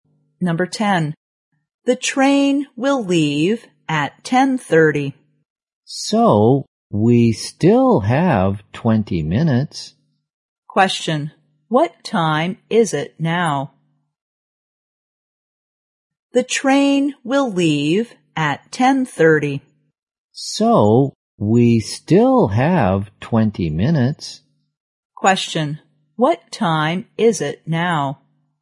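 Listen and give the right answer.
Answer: 10:10.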